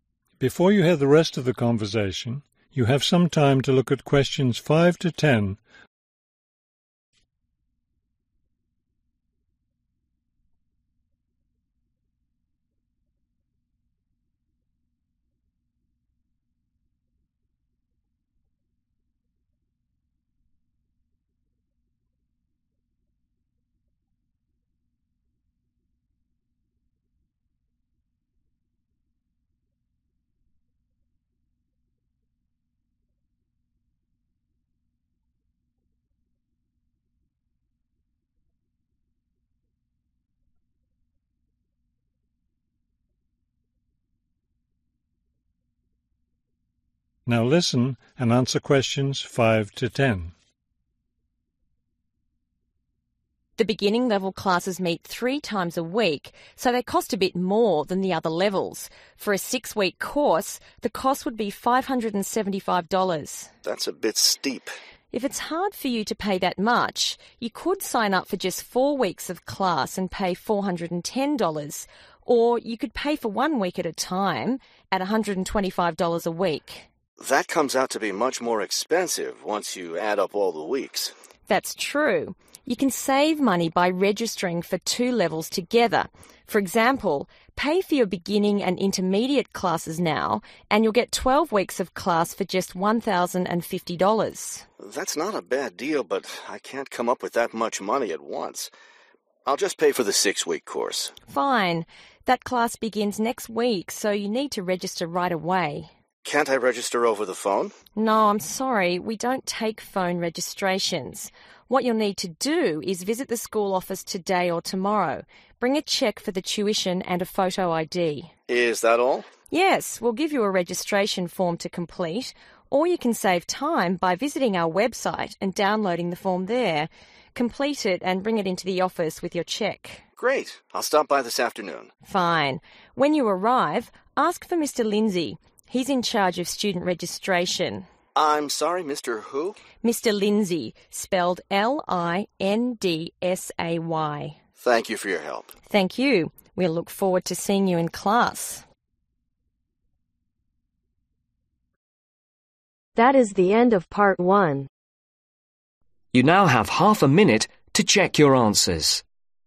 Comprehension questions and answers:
Write NO MORE THAN TWO WORDS OR A NUMBER for each answer.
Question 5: One week (5) $ ............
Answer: 125

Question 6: Four weeks (6) $ ............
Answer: 410

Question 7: Six weeks (7) $ ............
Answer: 575

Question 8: Twelve weeks (8) $ ............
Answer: 1,050

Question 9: Students can register for a class by visiting the ........... .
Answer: School Office

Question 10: ............ is in charge of student registration.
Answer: Mr. Lindsay